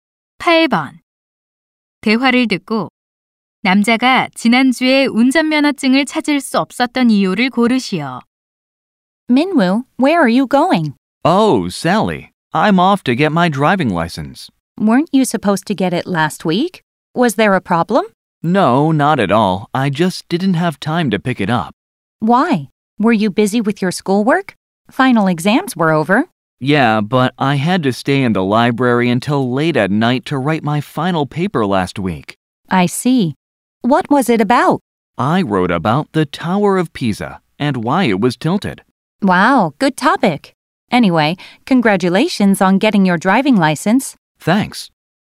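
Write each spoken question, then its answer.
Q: 대화를 듣고 남자가 지난주에 운전면허증을 찾을 수 없었던 이유를 고르시오.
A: 기말 보고서를 쓰느라 도서관에 늦게까지 있어야 해서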